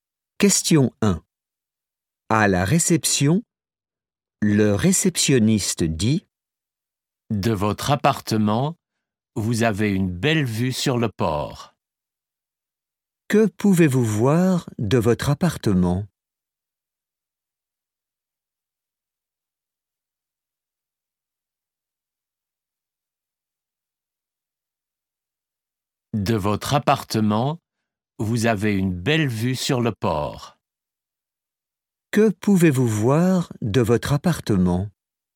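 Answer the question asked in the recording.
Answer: le port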